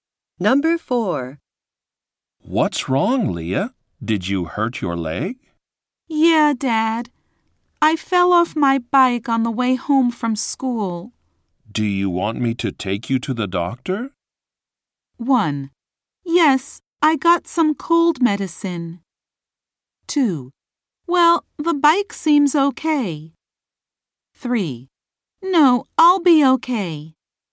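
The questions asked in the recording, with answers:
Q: Do you want me to take you to the doctor?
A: 3: No, I'll be okay.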